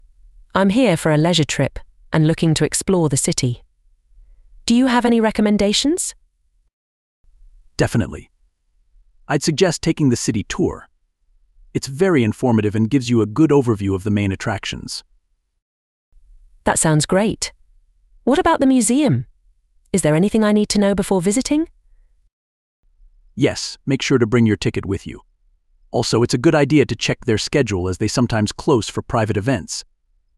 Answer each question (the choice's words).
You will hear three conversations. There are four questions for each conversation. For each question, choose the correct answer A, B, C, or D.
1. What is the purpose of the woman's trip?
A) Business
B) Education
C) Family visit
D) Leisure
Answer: Leisure

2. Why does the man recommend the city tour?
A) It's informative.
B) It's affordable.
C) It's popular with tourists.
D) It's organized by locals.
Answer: It's informative.

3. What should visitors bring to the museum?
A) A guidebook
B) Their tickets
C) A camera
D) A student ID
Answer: Their tickets

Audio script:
• Woman: "I'm here for a leisure trip and looking to explore the city. Do you have any recommendations?"
• Man: "Definitely! I'd suggest taking the city tour. It's very informative and gives you a good overview of the main attractions."
• Woman: "That sounds great. What about the museum? Is there anything I need to know before visiting?"
• Man: "Yes, make sure to bring your ticket with you. Also, it's a good idea to check their schedule as they sometimes close for private events."

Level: VSTEP B1